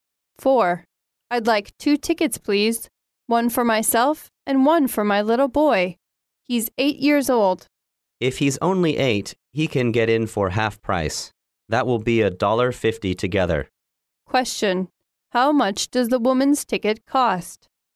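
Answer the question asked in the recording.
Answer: $1.00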